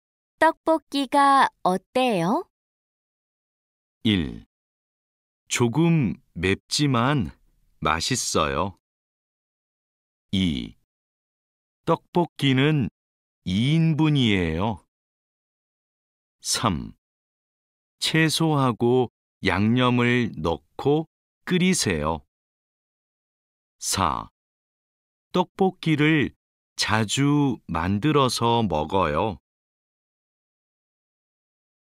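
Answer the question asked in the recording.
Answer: 1: 조금 맵지만 맛있어요.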